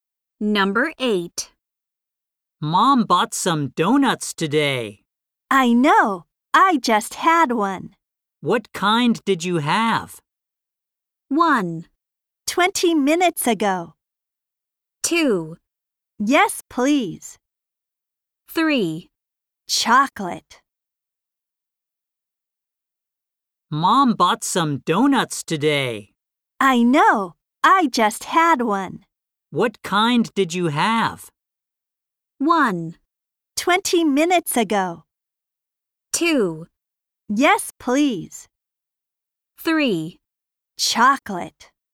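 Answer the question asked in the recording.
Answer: 3: Chocolate.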